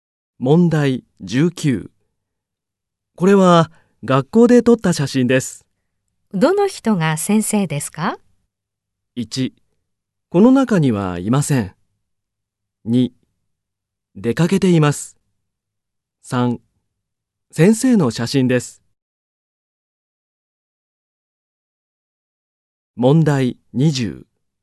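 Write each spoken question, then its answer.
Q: どの人が先生ですか?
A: 1: この中にはいません。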